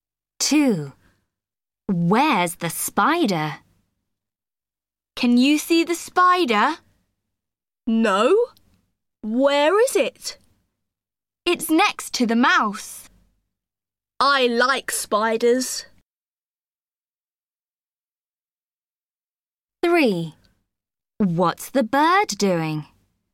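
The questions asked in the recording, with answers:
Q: Where's the spider?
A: Next to the mouse.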